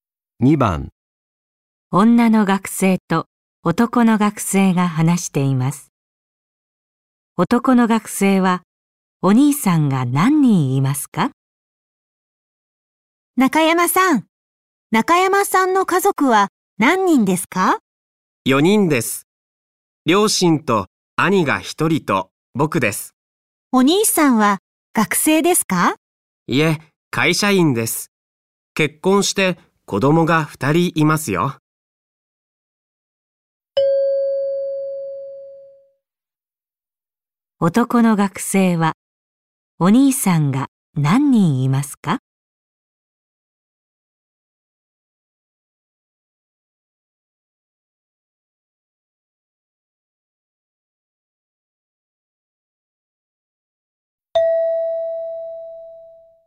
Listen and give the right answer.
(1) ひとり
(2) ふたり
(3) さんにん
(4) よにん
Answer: (1) ひとり

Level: N5 Listening · Test 1